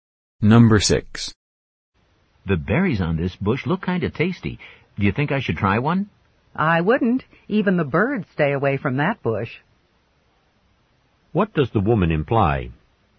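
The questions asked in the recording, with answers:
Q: What does the woman imply?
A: The berries are probably not safe to eat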